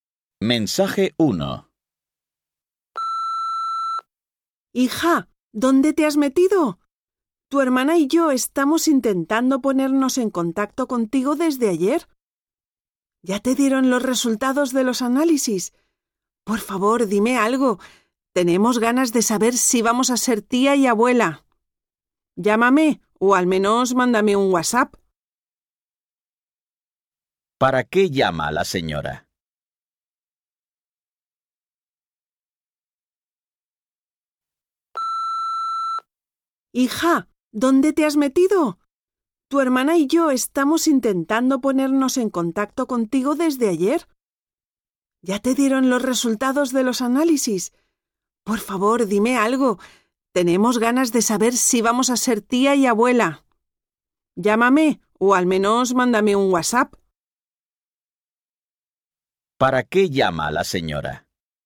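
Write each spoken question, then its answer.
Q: ¿Para qué llama la señora?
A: Para saber los resultados de los análisis (si su hija está embarazada)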